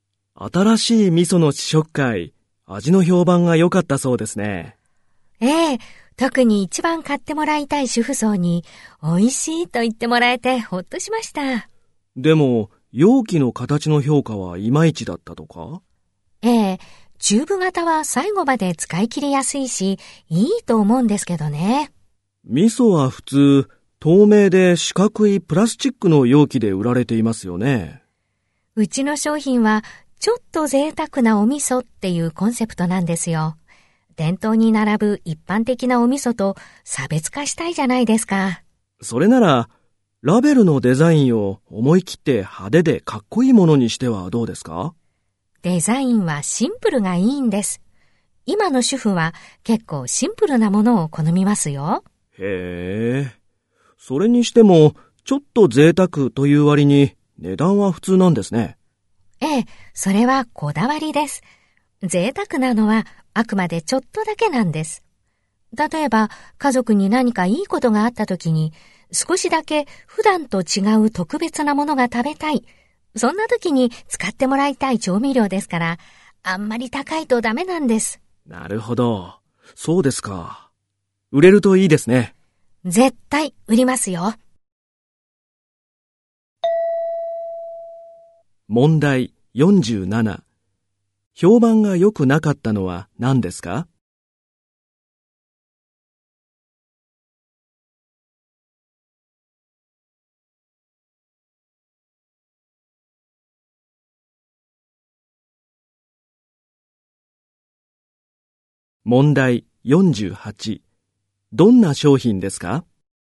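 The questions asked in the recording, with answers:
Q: 評判が良くなかったのは何ですか?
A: 容器の形

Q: どんな商品ですか?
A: 値段は普通のちょっと贅沢な味噌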